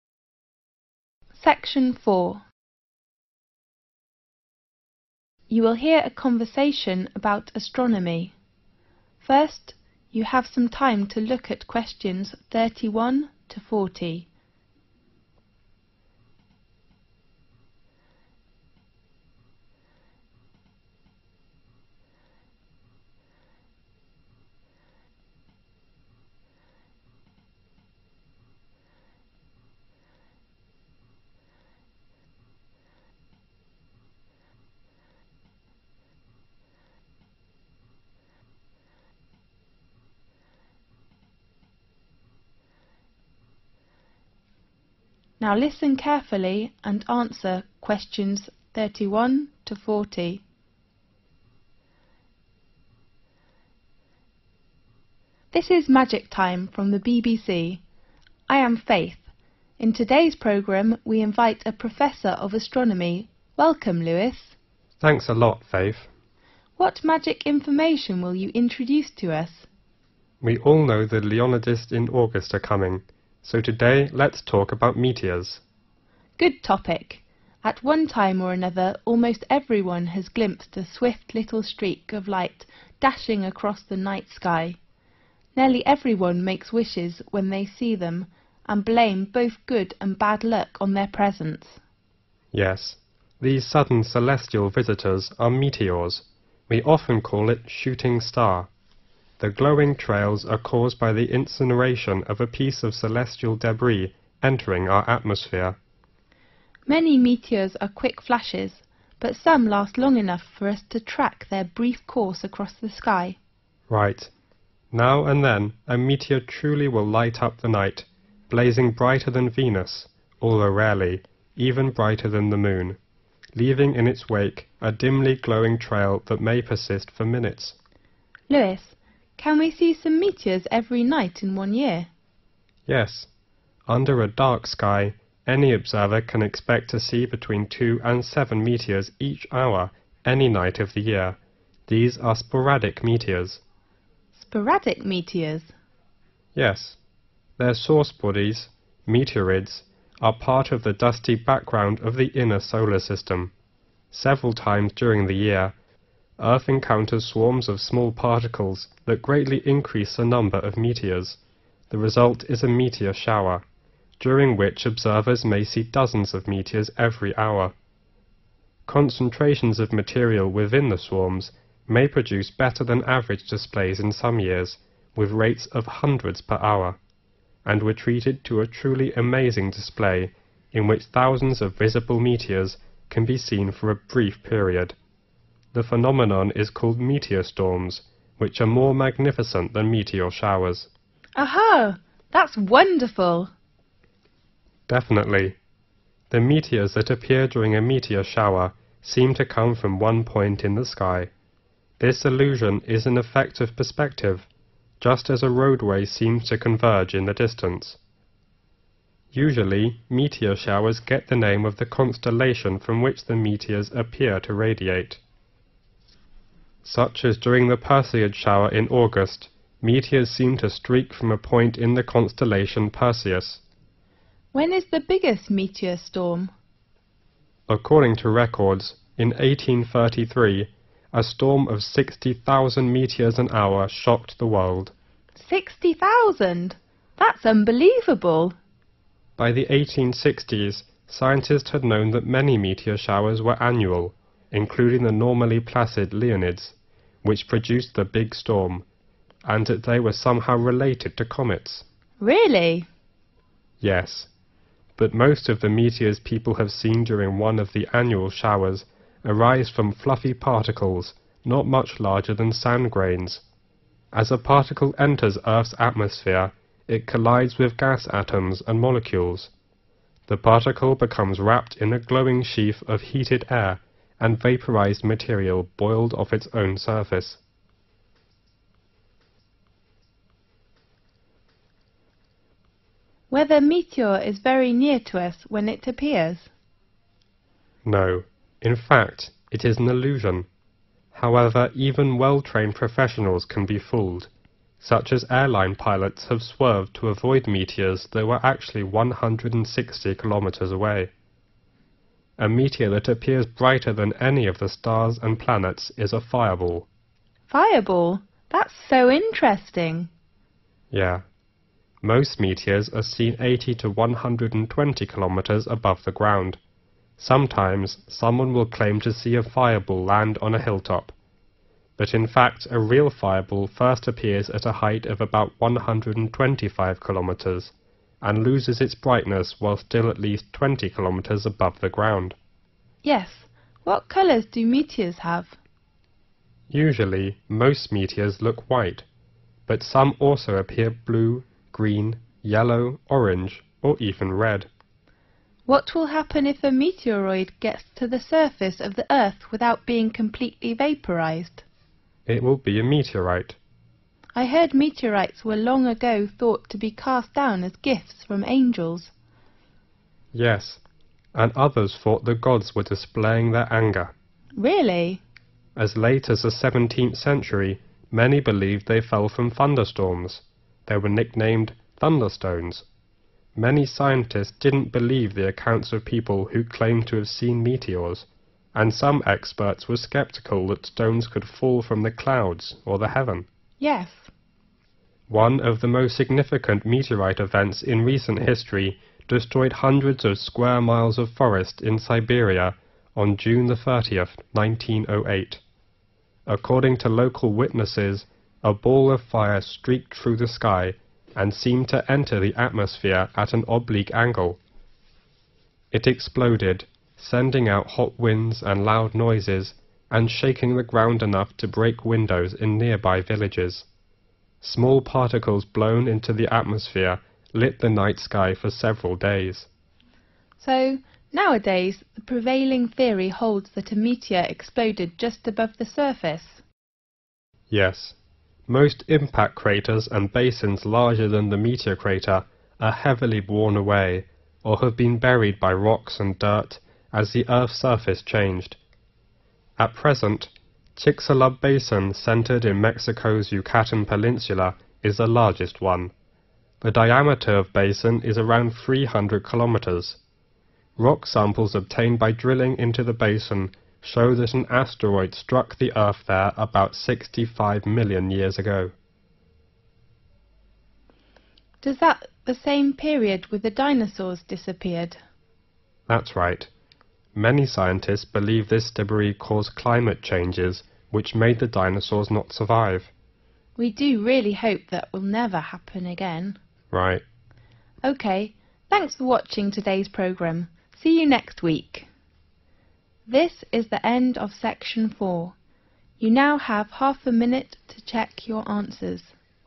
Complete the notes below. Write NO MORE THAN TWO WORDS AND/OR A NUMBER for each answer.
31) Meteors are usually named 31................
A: shooting star

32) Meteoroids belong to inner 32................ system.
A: solar

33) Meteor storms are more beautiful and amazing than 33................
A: meteor showers

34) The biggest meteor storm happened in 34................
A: 1833

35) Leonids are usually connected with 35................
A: comets

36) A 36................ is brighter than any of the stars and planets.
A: fireball

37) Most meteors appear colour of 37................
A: white

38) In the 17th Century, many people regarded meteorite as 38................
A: thunderstorms/thunderstones

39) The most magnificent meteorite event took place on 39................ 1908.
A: June

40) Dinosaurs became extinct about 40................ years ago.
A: 65 million